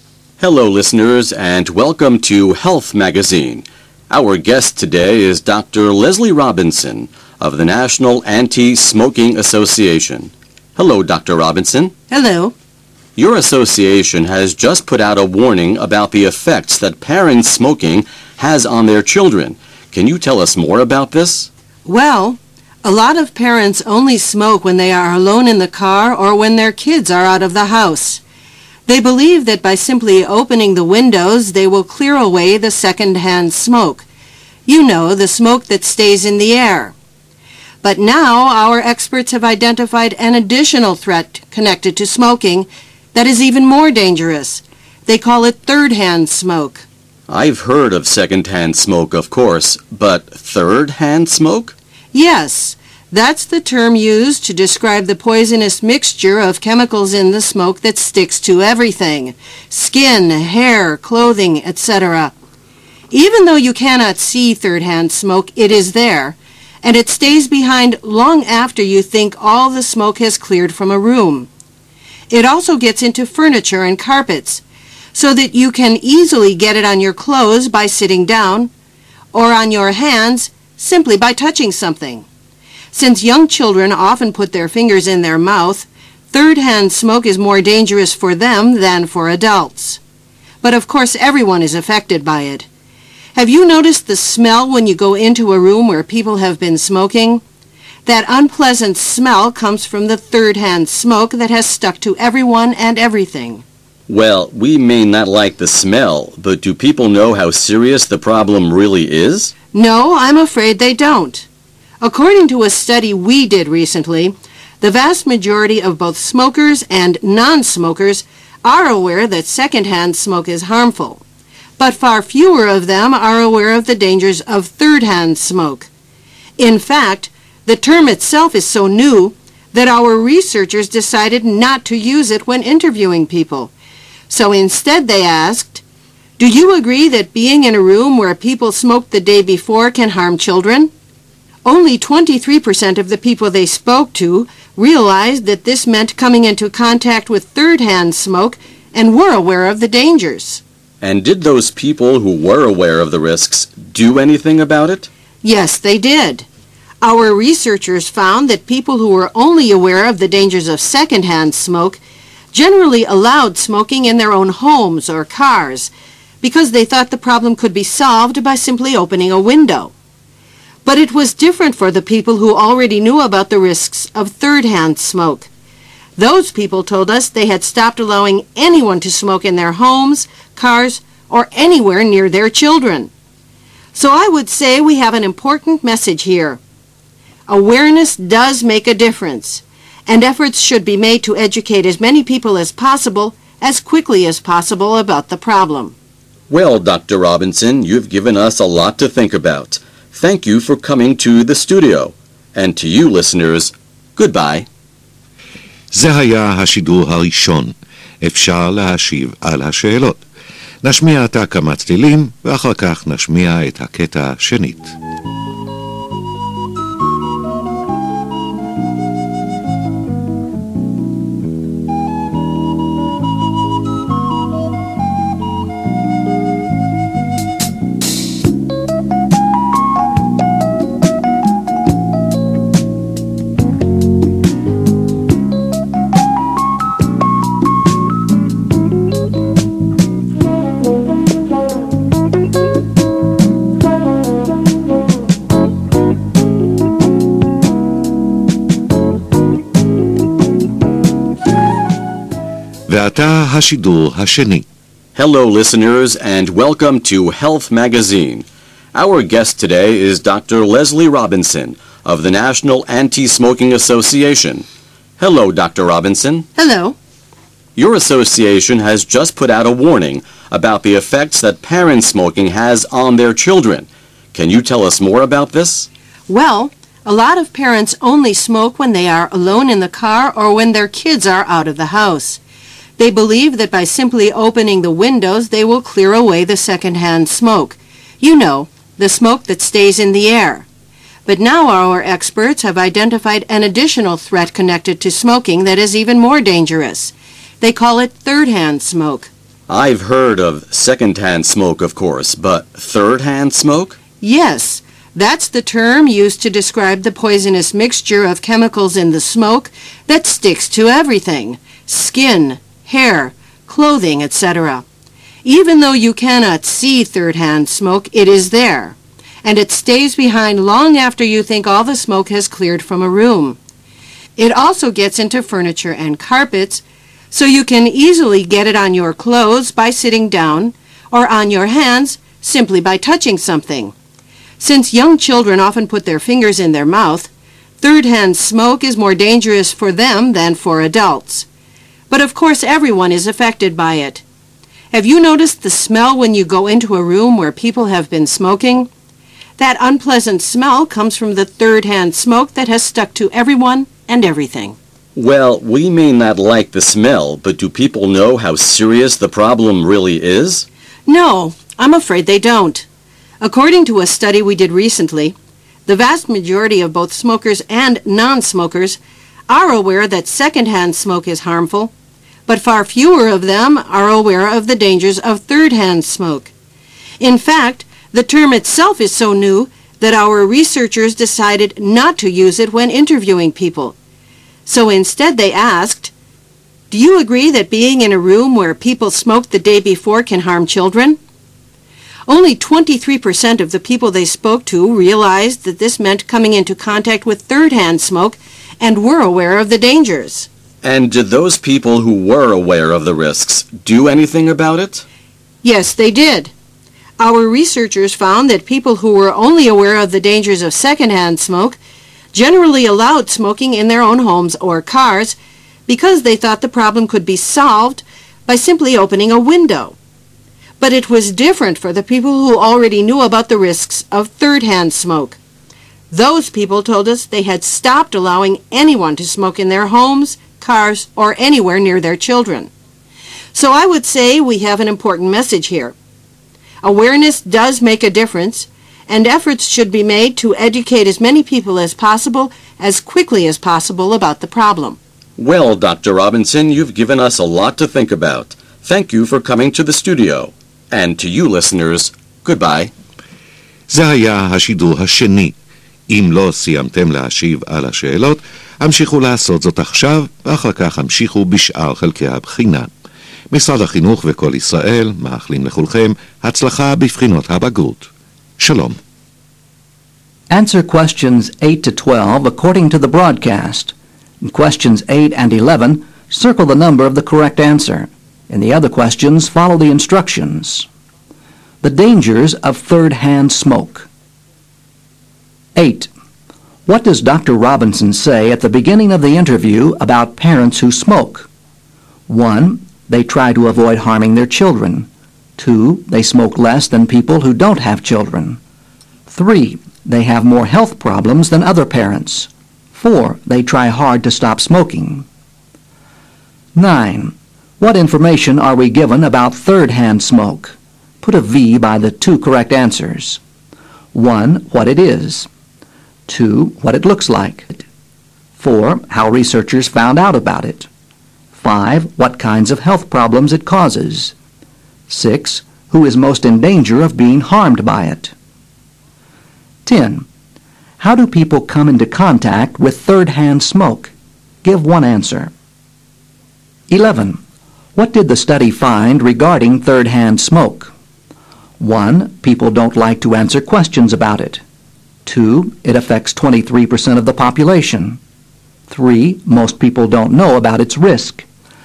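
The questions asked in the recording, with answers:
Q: What does Dr. Robinson say at the beginning of the interview about parents who smoke?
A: 1: They try to avoid harming their children.

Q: What information are we given about third-hand smoke?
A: 1: What it is; 6: Who is most in danger of being harmed by it

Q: How do people come into contact with third-hand smoke?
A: By sitting on furniture or touching things it has stuck to

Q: What did the study find regarding third-hand smoke?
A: 3: Most people don't know about its risk.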